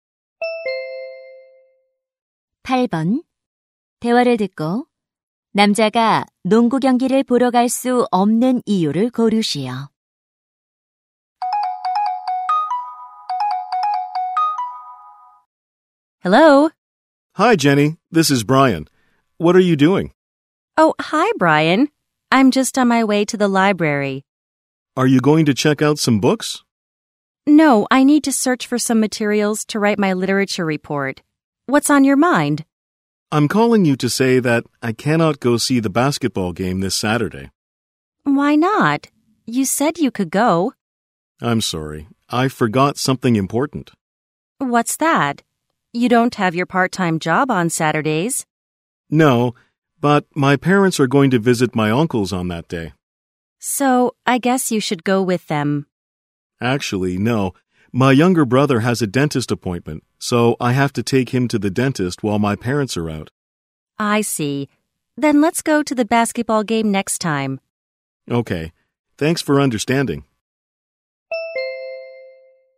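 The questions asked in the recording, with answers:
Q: 대화를 듣고 남자가 농구 경기를 보러 갈 수 없는 이유를 고르시오.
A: 남동생을 치과에 데려가야 해서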